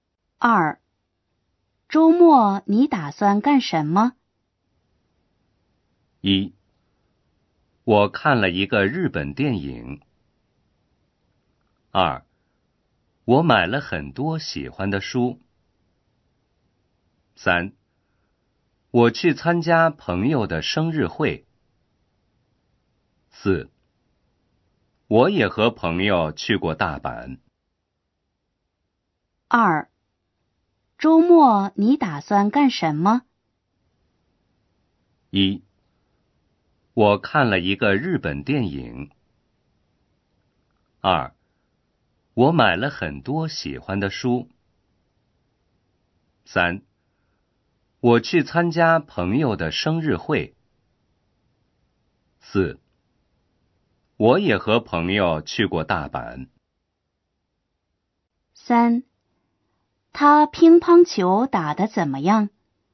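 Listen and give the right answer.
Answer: 3: 我去参加朋友的生日会。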